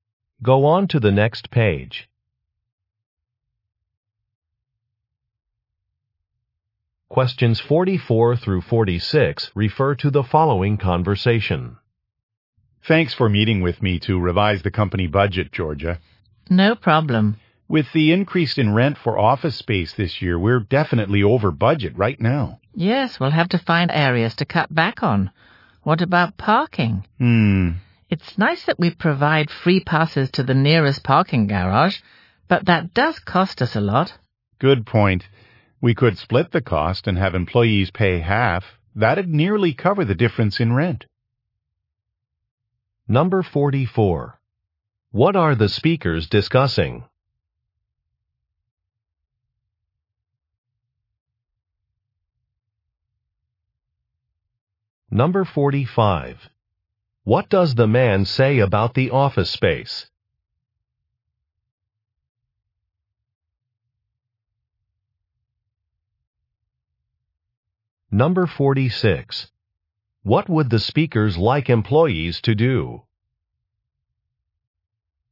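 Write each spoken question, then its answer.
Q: What are the speakers discussing?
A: Revising the company budget

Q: What would the speakers like employees to do?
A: Pay half the cost of parking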